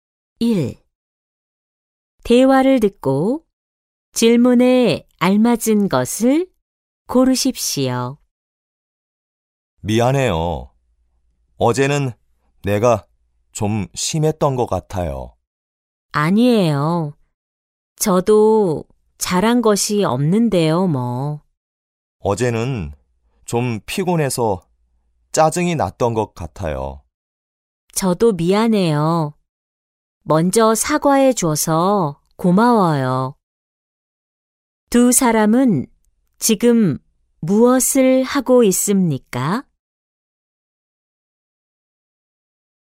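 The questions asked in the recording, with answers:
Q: 두 사람은 지금 무엇을 하고 있습니까?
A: 서로 사과하고 있습니다.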